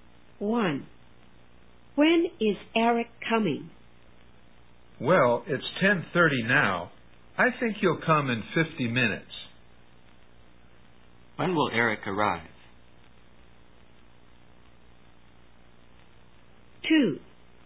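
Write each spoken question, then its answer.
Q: When will Eric arrive?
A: At 11:20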